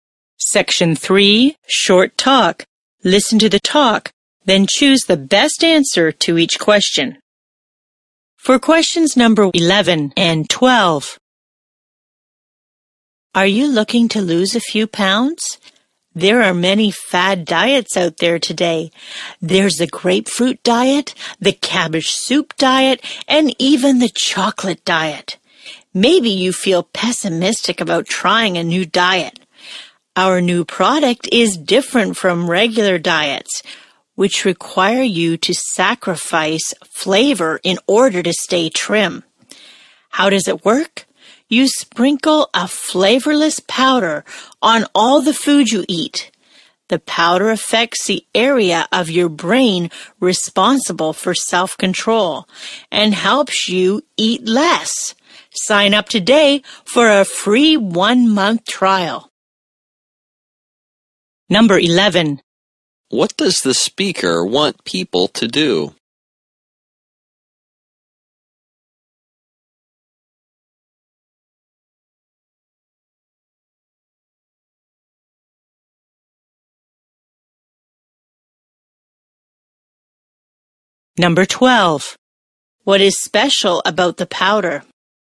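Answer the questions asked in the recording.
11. Sign up for a free 1-month trial of the diet product.
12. It is flavorless and affects the brain's self-control area to help you eat less.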